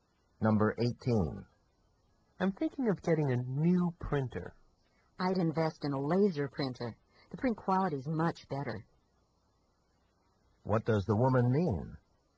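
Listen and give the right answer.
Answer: He should buy a laser printer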